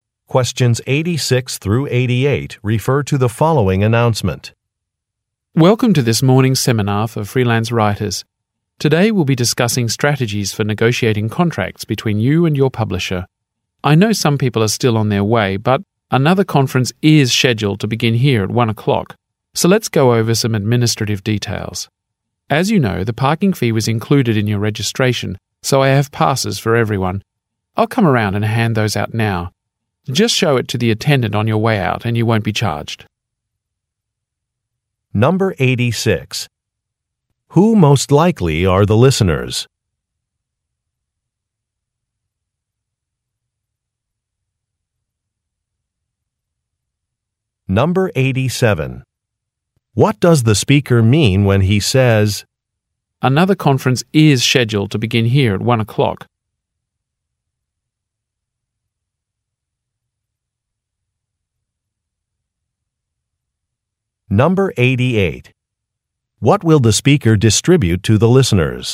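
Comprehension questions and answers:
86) Who most likely are the listeners?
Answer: Writers

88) What will the speaker distribute to the listeners?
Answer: Parking passes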